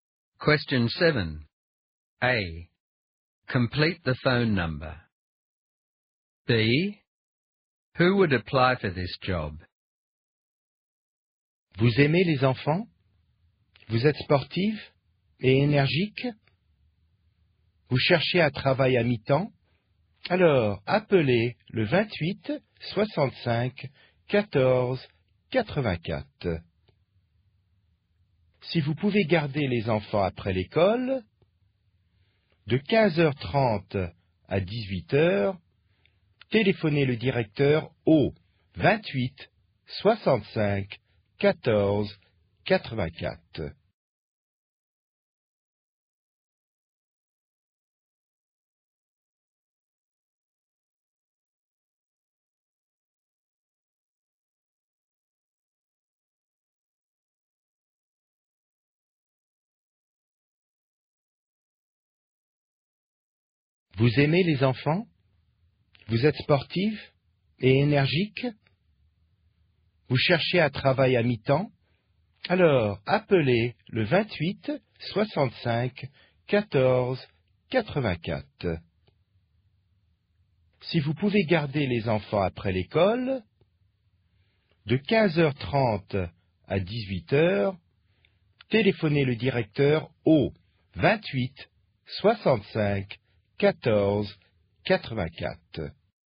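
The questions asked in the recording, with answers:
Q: A. Complete the phone number.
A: 28 65 14 84

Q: B. Who would apply for this job?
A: A sporty, energetic person who likes children and wants part-time work looking after children after school (3:30–6 pm)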